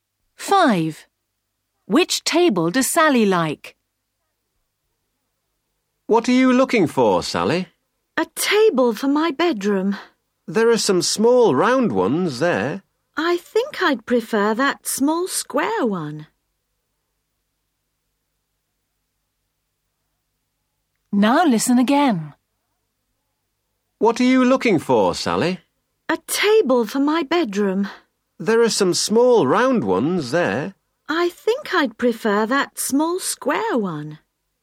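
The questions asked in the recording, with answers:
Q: Which table does Sally like?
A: the small square one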